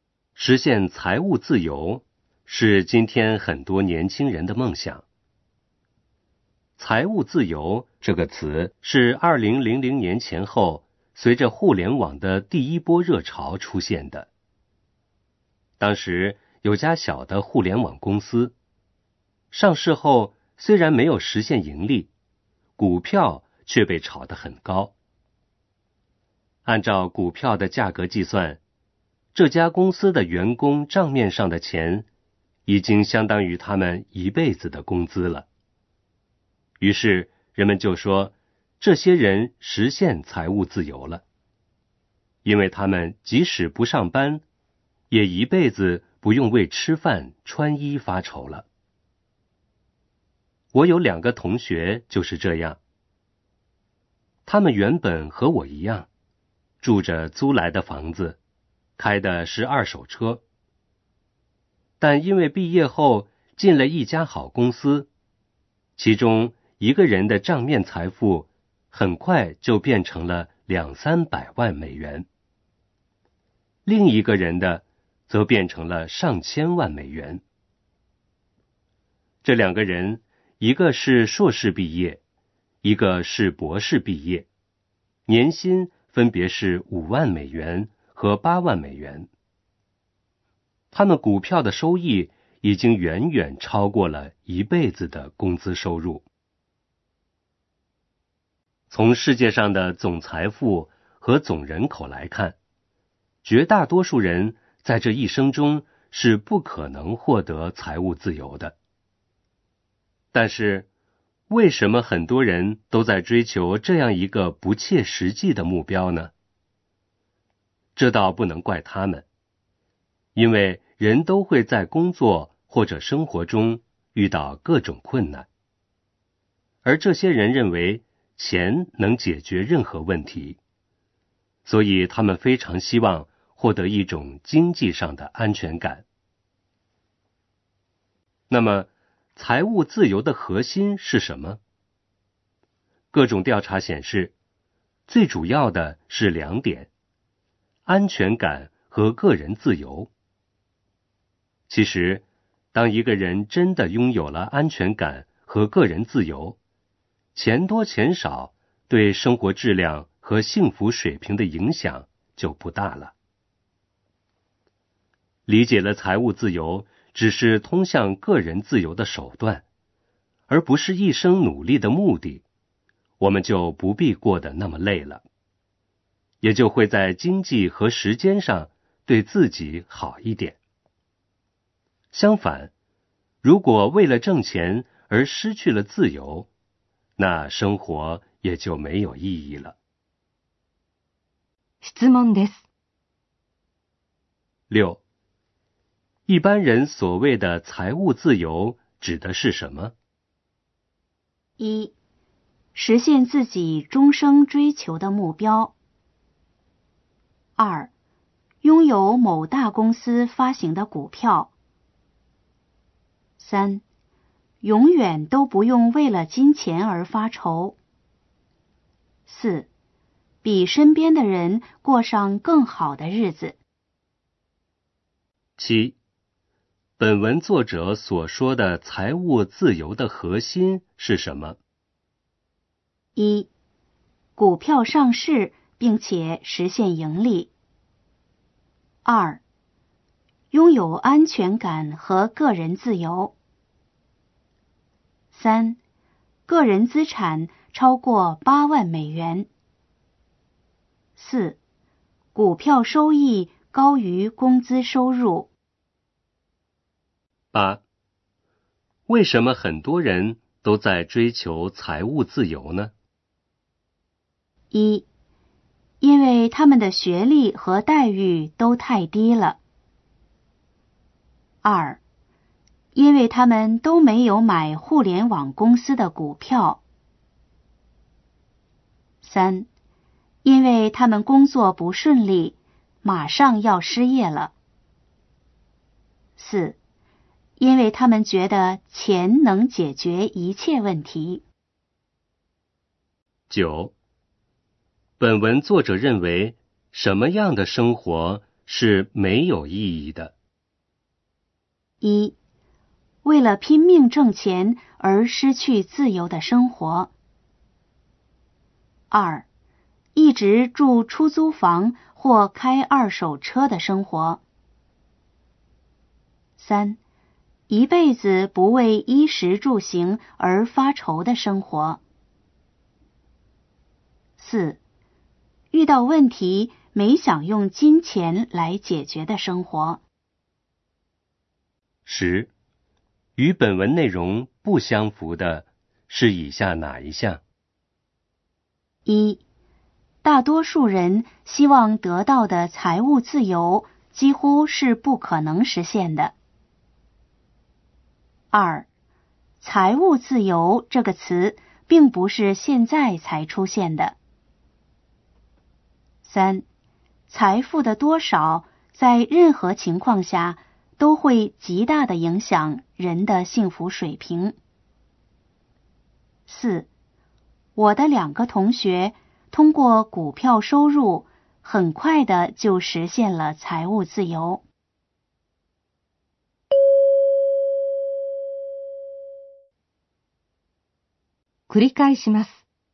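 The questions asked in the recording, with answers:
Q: 一般人所谓的财务自由指的是什么?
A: 3: 永远都不用为了金钱而发愁

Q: 本文作者所说的财务自由的核心是什么?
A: 2: 拥有安全感和个人自由

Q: 为什么很多人都在追求财务自由呢?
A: 4: 因为他们觉得钱能解决一切问题

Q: 本文作者认为什么样的生活是没有意义的?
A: 1: 为了拼命挣钱而失去自由的生活

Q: 与本文内容不相符的是以下哪一项?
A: 3: 财富的多少在任何情况下都会极大的影响人的幸福水平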